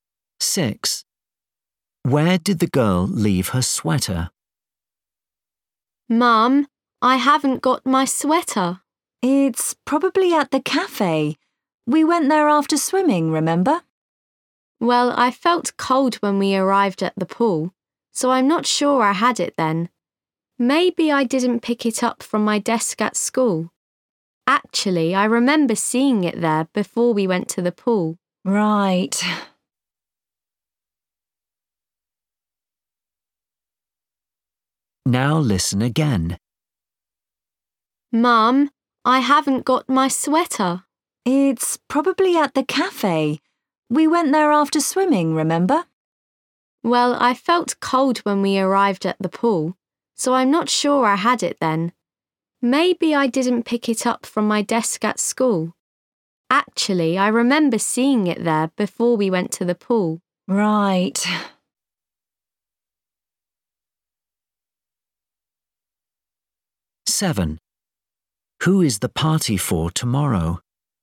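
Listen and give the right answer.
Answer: At school, on her desk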